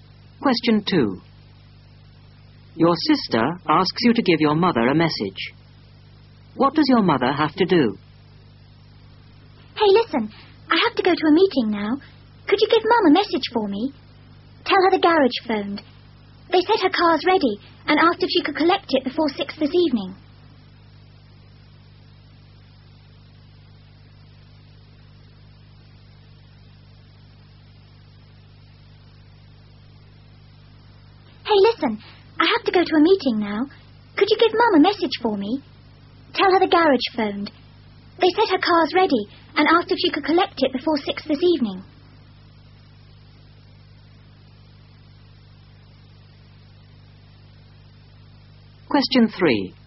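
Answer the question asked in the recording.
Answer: Collect her car from the garage before 6 this evening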